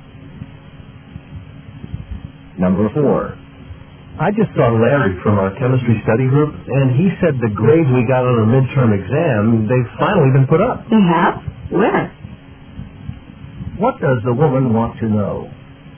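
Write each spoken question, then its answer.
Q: What does the woman want to know?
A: Where the midterm grades have been posted.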